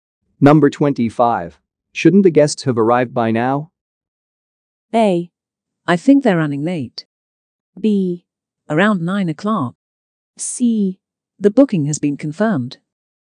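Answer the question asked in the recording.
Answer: A: I think they're running late.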